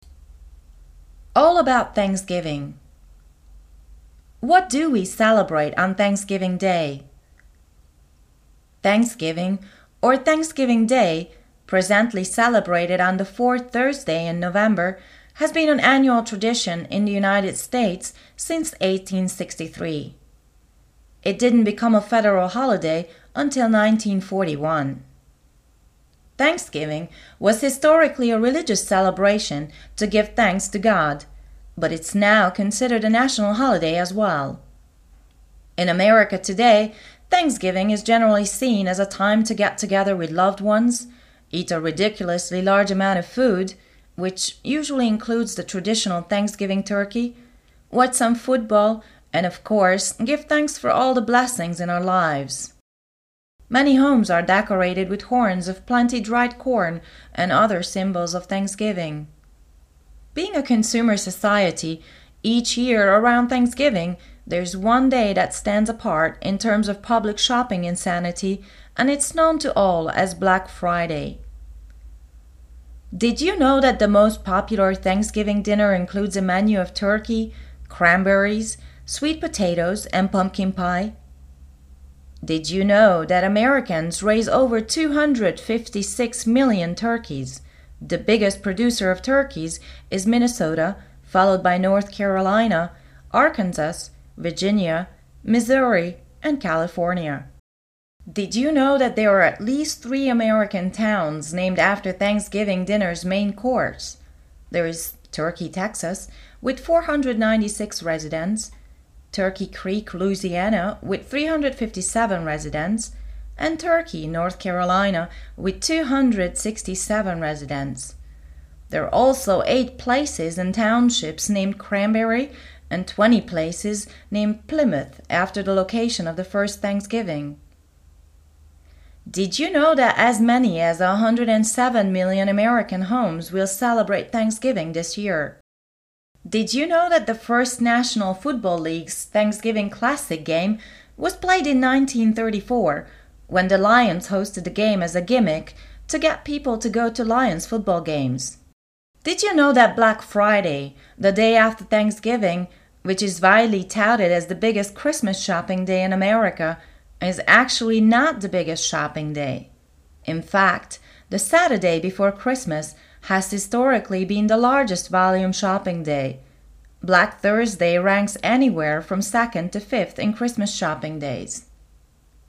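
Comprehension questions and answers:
Listen to the text about Thanksgiving and choose all the correct answers to the questions.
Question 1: When is Thanksgiving annually celebrated?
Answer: On the fourth Thursday in November

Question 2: Since when is it a federal holiday?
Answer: Since 1941

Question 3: What is the holiday about nowadays?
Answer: Getting together with loved ones, eating a lot, watching football and giving thanks

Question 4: What are the must-have dishes of a thanksgiving meal?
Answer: Turkey, cranberries, sweet potatoes and pumpkin pie

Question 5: How many turkeys are raised in the USA?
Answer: Over 256 million

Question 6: How many residents does Turkey, North-Carolina have?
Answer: 267

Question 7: How many places in the USA are named Cranberry?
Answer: 8

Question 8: What is the day after Thanksgiving called?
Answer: Black Friday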